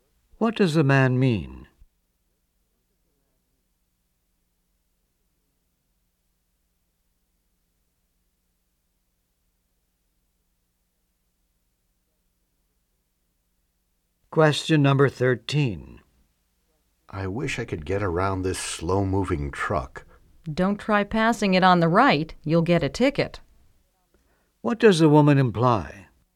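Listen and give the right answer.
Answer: Passing on the right is illegal.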